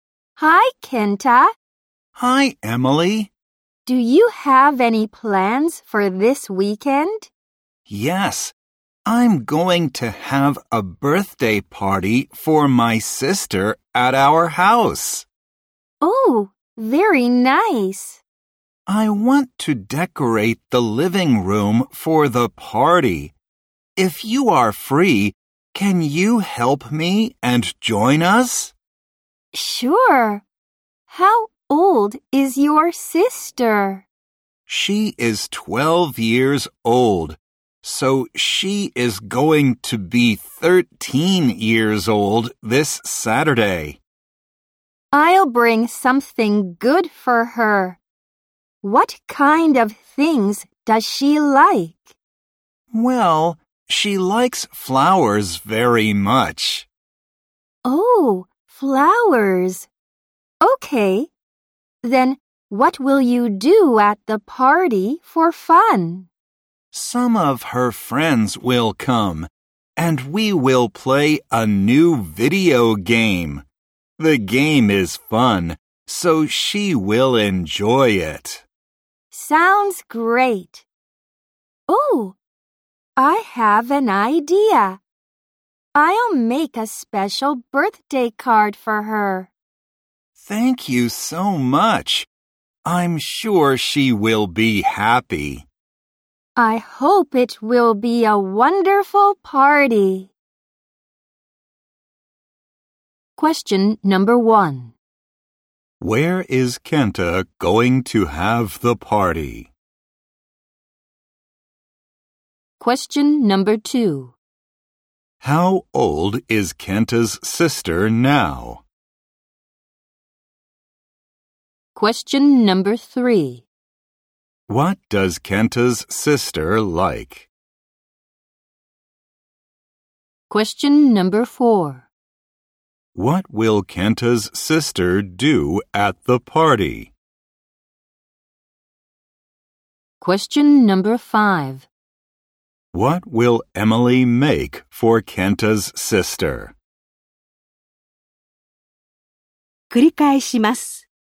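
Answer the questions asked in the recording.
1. At his house
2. 12 years old
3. Flowers
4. Play a new video game with her friends
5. A special birthday card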